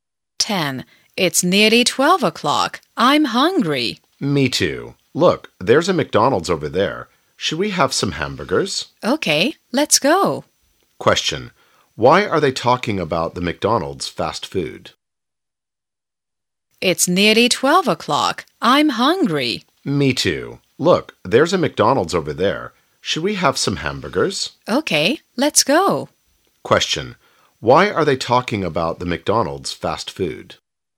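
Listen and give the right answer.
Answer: Because they are hungry and want to have lunch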